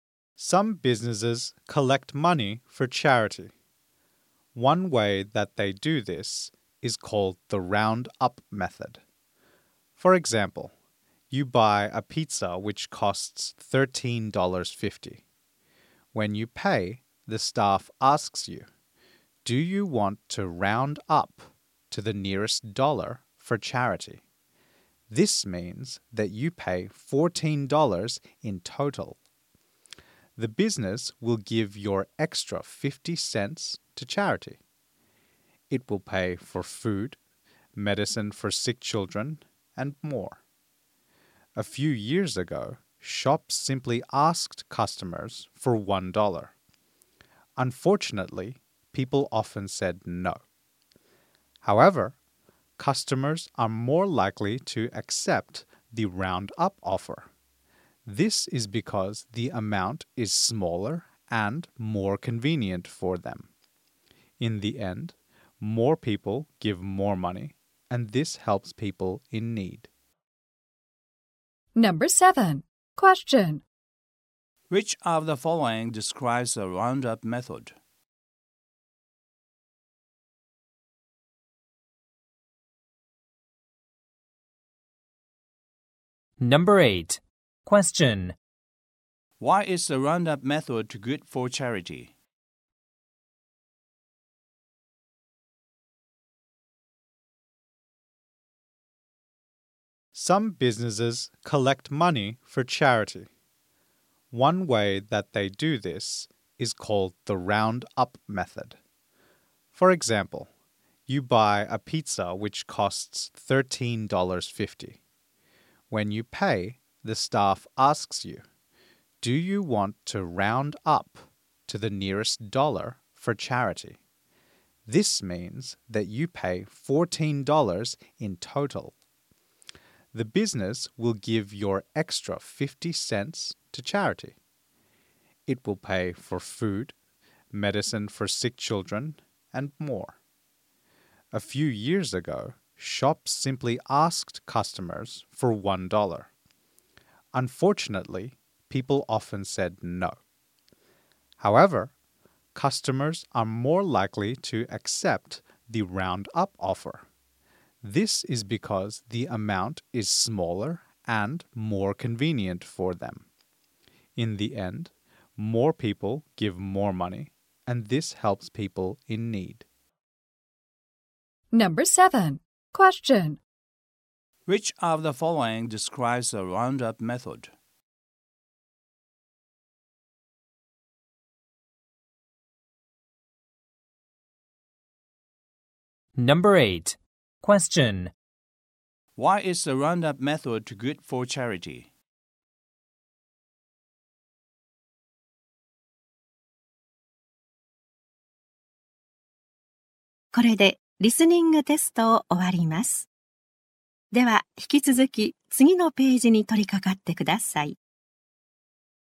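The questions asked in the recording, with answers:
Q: Which of the following describes the roundup method?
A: Customers pay up to the nearest dollar and the extra goes to charity

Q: Why is the roundup method good for charity?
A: The amount is small and convenient, so more people give and more money is collected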